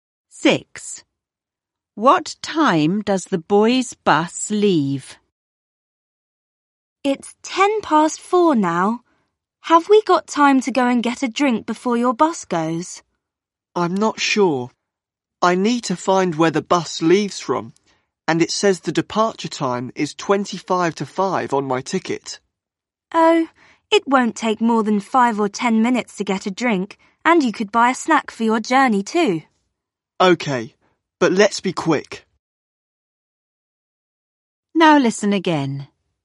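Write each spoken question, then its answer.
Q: What time does the boys' bus leave?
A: 4:25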